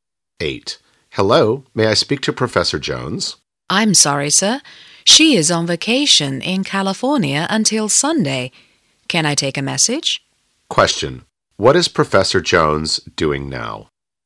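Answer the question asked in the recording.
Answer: On vacation in California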